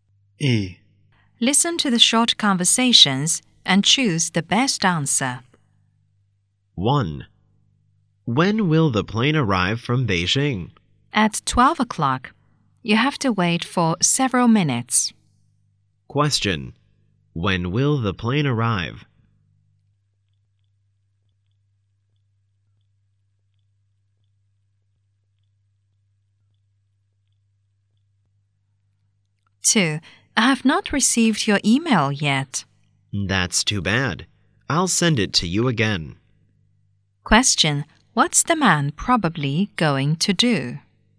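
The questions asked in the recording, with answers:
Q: What's the man probably going to do?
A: Send the email again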